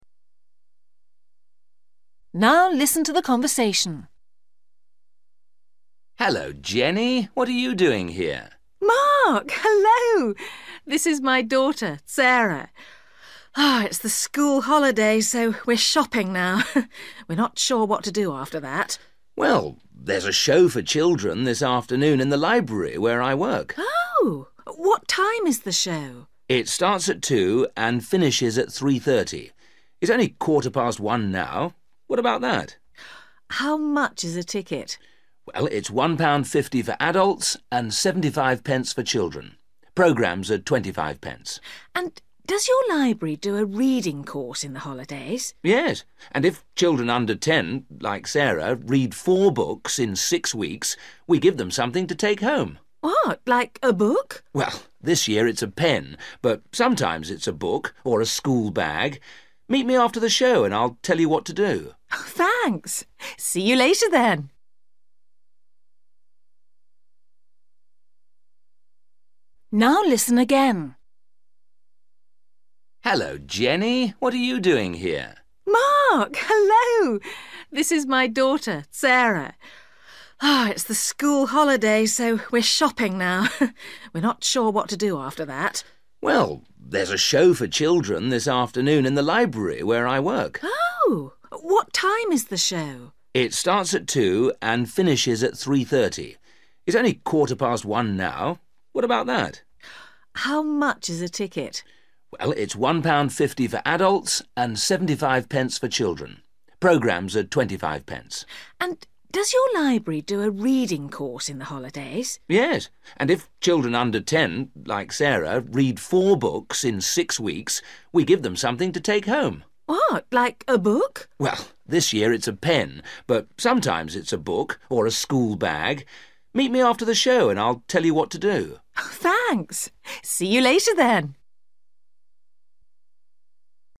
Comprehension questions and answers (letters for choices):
For questions 11-15, tick (✓) A, B or C.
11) The show begins at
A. 1.15.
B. 2.00.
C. 3.30.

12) A child's ticket costs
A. 25p.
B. 75p.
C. £1.50.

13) The holiday reading course is for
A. 4 weeks.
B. 6 weeks.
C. 10 weeks.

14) This year from the library, children can win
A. a pen.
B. a school bag.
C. a book.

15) Jenny should meet Mark again.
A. next week.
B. tomorrow.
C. today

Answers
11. B
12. B
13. B
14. A
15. C

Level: A2